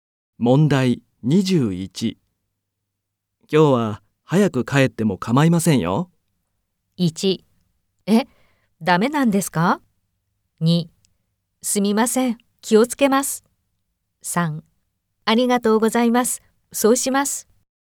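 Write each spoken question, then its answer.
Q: 今日は早く帰っても構いませんよ。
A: 3: ありがとうございます。そうします。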